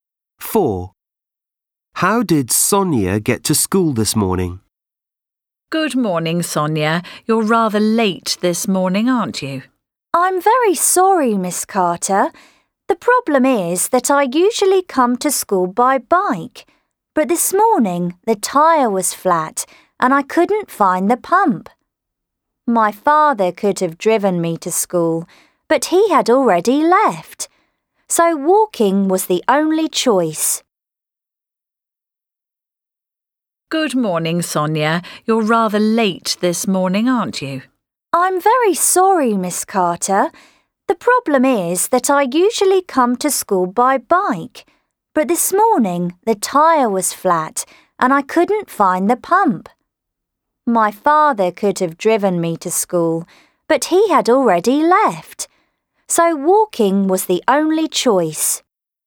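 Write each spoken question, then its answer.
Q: How did Sonia get to school this morning?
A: She walked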